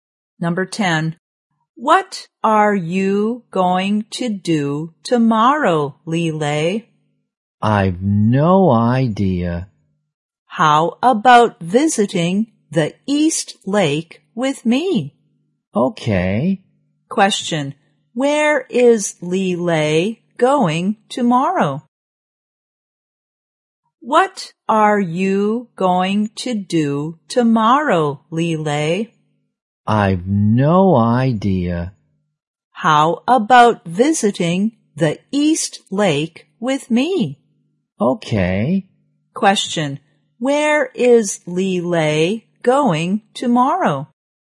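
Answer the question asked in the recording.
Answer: The East Lake.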